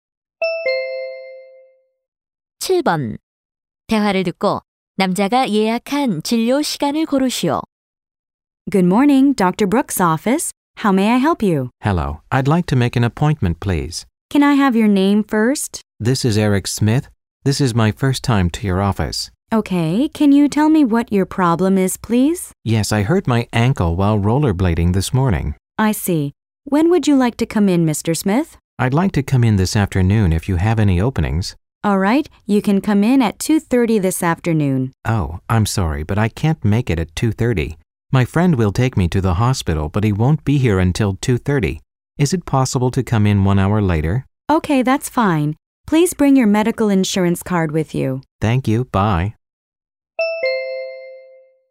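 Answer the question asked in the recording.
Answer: 오후 3시 30분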